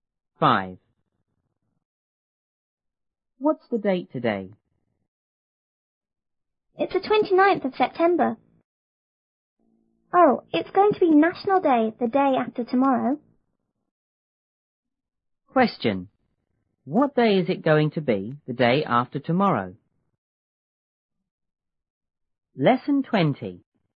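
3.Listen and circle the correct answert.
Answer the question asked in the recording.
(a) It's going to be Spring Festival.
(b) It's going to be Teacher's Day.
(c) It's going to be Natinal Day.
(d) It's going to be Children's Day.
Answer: (c) It's going to be Natinal Day.

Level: 初中英语广州版1B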